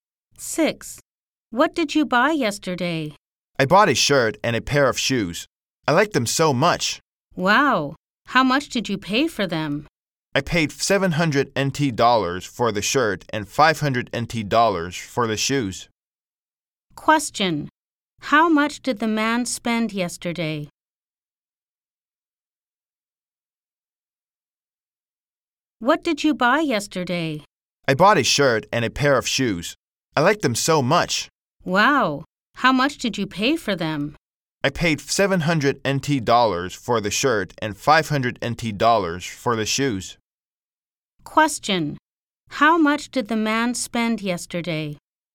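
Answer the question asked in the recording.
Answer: 1,200 NT dollars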